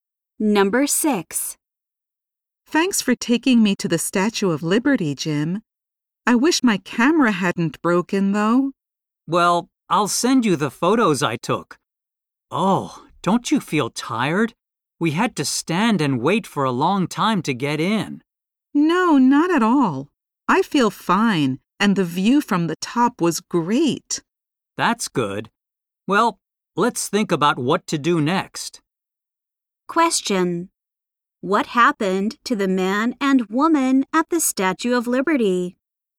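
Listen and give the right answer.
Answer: They had to wait a long time to get in.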